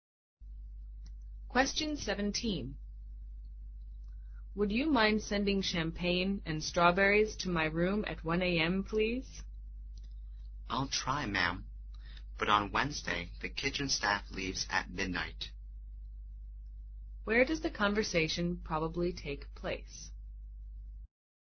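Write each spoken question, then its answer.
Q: Where does the conversation probably take place?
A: In a hotel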